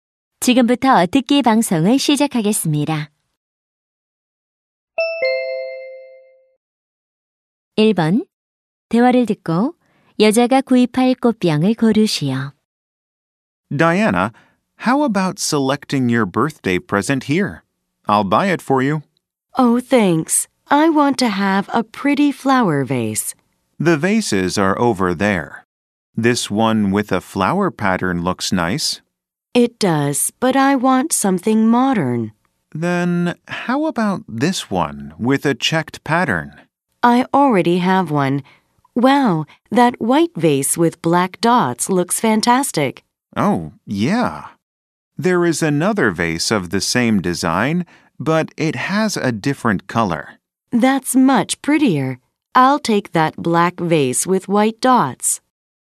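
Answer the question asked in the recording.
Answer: 흰색 물방울무늬가 있는 검은색 꽃병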